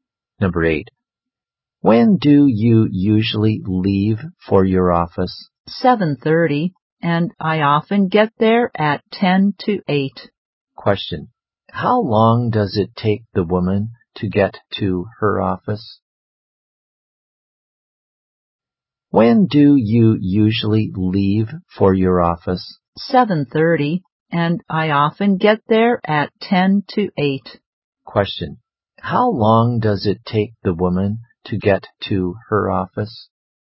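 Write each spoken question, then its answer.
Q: How long does it take the woman to get to her office?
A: 20 minutes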